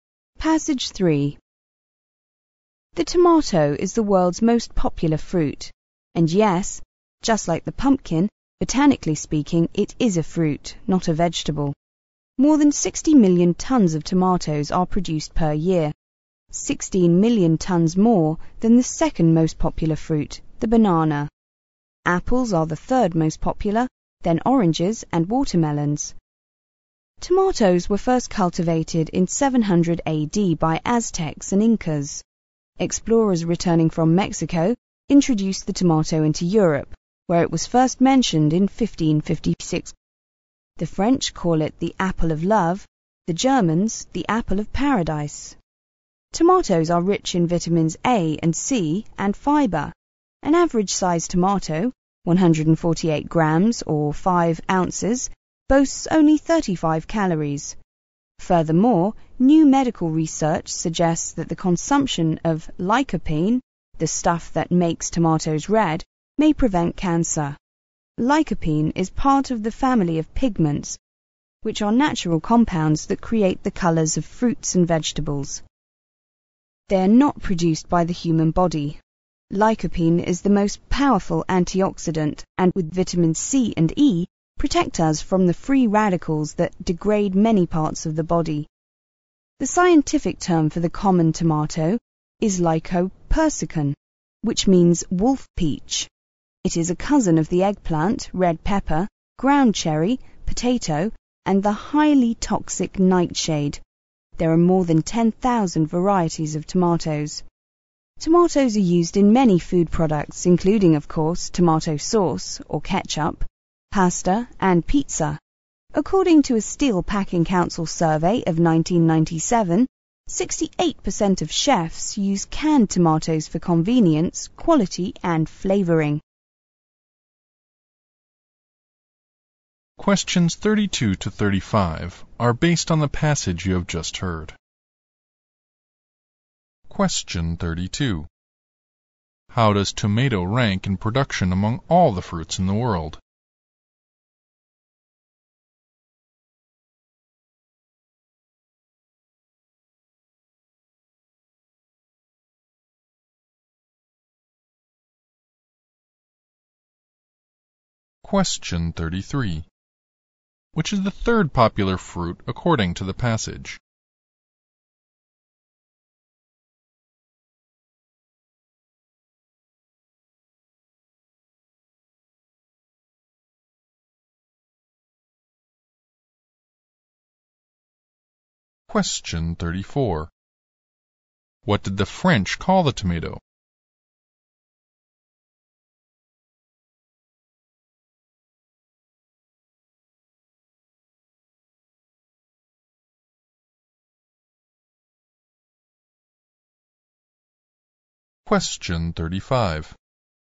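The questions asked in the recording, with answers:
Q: How does tomato rank in production among all the fruits in the world?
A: First.

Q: Which is the third popular fruit according to the passage?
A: Apples.

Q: What did the French call the tomato?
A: The apple of love.

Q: What does the word lycopersicon mean according to the passage?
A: Wolf peach.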